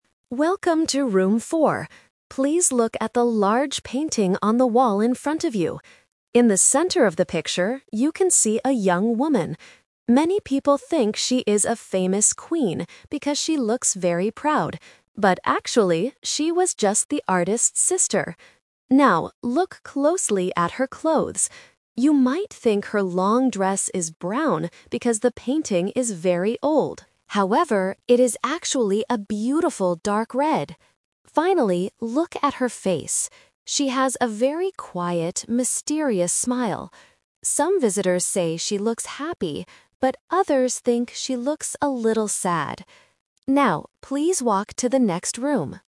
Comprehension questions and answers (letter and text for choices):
Listen to the museum audio guide and choose the correct answer (A, B, or C).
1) Who is the young woman in the painting?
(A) A famous queen.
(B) The artist's sister.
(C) The artist's wife.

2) What color is the woman's long dress?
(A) Brown.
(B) Dark red.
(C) Black.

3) How is the woman's smile described?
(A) It is quiet and mysterious.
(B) It is very wide and happy.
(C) It is angry and proud.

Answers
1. (B) The artist's sister.
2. (B) Dark red.
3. (A) It is quiet and mysterious.

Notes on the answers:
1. The audio guide says, "But actually, she was just the artist's sister." The Trap: Option (A) is a trap because the guide mentions that "Many people think she is a famous queen," but this is not the truth. Option (C) is plausible but is never mentioned.
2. The guide uses the "Twist" technique: "However, it is actually a beautiful dark red." The Trap: Option (A) is a trap because the dress looks brown because the painting is old, but its real color is red. Option (C) is not mentioned.
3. The audio guide clearly states, "She has a very quiet, mysterious smile." The Trap: Option (B) is a trap because the word "happy" is mentioned ("Some visitors say she looks happy"), but her smile is not described as "wide". Option (C) is a trap because the word "proud" is used earlier to describe her general look, not her smile.

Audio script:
Audio Guide: Welcome to Room 4. Please look at the large painting on the wall in front of you. In the center of the picture, you can see a young woman. Many people think she is a famous queen because she looks very proud. But actually, she was just the artist's sister. Now, look closely at her clothes. You might think her long dress is brown because the painting is very old. However, it is actually a beautiful dark red. Finally, look at her face. She has a very quiet, mysterious smile. Some visitors say she looks happy, but others think she looks a little sad. Now, please walk to the next room.

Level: A2